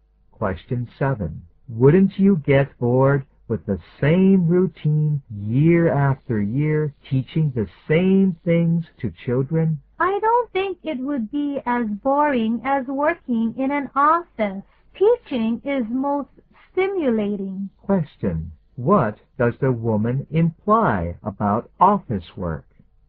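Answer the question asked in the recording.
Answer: Office work is more boring than teaching.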